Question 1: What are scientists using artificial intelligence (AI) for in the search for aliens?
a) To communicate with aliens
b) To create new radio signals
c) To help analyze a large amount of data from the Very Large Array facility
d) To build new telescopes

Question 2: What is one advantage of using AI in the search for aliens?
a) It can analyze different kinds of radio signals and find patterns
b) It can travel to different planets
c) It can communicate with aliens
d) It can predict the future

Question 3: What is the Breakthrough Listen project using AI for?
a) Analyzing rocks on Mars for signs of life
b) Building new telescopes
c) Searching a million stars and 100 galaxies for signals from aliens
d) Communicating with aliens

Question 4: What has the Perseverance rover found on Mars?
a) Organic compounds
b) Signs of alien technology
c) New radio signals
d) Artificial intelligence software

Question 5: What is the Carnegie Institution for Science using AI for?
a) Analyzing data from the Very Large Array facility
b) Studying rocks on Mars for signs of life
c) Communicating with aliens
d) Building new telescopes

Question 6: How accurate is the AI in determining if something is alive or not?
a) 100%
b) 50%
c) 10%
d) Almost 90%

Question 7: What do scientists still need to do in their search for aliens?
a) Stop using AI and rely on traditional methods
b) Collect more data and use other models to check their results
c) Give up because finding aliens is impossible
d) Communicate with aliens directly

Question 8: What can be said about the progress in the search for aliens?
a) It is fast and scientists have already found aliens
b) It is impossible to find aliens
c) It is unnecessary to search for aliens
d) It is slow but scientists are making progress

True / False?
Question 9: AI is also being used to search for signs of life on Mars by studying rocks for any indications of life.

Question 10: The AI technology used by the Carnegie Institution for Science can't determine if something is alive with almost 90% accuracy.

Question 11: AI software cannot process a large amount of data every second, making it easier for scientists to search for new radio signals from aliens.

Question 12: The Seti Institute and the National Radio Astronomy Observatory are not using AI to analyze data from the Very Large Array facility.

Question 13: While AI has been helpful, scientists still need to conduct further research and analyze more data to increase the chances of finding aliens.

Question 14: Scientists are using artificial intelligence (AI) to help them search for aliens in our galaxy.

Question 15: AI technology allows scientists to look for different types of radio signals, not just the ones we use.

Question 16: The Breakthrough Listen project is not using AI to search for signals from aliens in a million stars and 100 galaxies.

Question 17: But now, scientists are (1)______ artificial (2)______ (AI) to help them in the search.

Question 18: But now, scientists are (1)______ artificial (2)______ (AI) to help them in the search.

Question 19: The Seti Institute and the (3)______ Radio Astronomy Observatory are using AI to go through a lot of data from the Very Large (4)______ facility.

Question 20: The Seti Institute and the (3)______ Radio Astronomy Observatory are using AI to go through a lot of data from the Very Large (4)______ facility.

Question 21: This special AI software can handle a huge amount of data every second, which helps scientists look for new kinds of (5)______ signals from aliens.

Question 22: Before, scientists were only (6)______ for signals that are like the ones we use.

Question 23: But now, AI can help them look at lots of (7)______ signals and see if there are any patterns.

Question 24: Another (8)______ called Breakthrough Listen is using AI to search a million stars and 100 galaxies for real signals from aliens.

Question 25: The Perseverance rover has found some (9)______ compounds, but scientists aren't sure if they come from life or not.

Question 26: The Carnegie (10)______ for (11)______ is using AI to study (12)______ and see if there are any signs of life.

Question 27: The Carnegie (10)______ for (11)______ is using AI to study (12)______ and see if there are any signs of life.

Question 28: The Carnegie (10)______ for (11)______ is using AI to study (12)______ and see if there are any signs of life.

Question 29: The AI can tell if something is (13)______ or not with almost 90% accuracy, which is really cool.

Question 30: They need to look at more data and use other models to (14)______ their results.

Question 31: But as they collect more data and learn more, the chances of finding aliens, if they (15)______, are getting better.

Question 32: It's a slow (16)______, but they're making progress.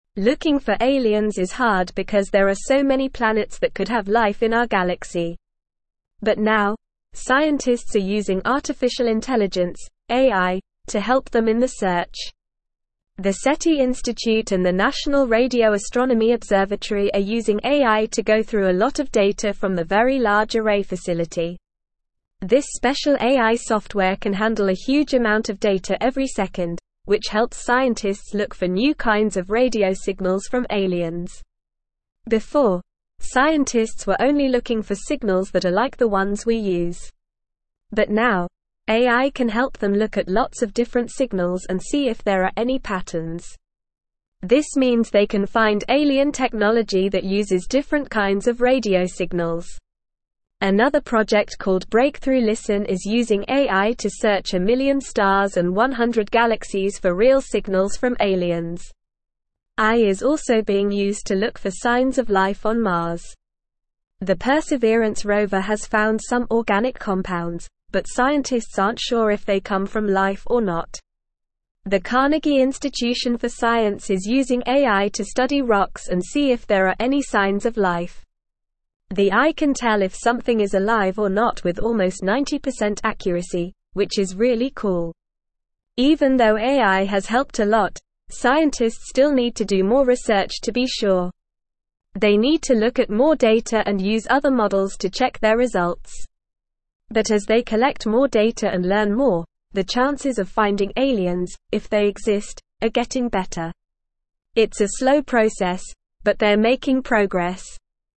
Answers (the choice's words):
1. To help analyze a large amount of data from the Very Large Array facility
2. It can analyze different kinds of radio signals and find patterns
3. Searching a million stars and 100 galaxies for signals from aliens
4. Organic compounds
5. Studying rocks on Mars for signs of life
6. Almost 90%
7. Collect more data and use other models to check their results
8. It is slow but scientists are making progress
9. True
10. False
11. False
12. False
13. True
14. True
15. True
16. False
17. using
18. intelligence
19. National
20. Array
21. radio
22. looking
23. different
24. project
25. organic
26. Institution
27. Science
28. rocks
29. alive
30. check
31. exist
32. process

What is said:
Looking for aliens is hard because there are so many planets that could have life in our galaxy. But now, scientists are using artificial intelligence (AI) to help them in the search. The Seti Institute and the National Radio Astronomy Observatory are using AI to go through a lot of data from the Very Large Array facility. This special AI software can handle a huge amount of data every second, which helps scientists look for new kinds of radio signals from aliens.
Before, scientists were only looking for signals that are like the ones we use. But now, AI can help them look at lots of different signals and see if there are any patterns. This means they can find alien technology that uses different kinds of radio signals. Another project called Breakthrough Listen is using AI to search a million stars and 100 galaxies for real signals from aliens.
AI is also being used to look for signs of life on Mars. The Perseverance rover has found some organic compounds, but scientists aren't sure if they come from life or not. The Carnegie Institution for Science is using AI to study rocks and see if there are any signs of life. The AI can tell if something is alive or not with almost 90% accuracy, which is really cool.
Even though AI has helped a lot, scientists still need to do more research to be sure. They need to look at more data and use other models to check their results. But as they collect more data and learn more, the chances of finding aliens, if they exist, are getting better. It's a slow process, but they're making progress.

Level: Level 3